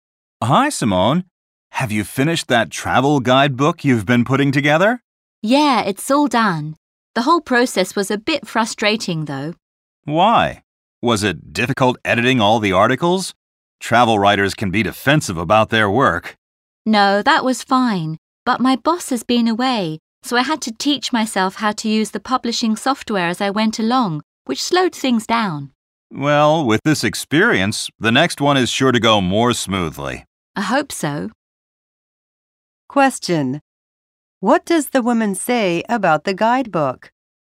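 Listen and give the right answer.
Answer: Making it was slow because she had to teach herself the publishing software while her boss was away.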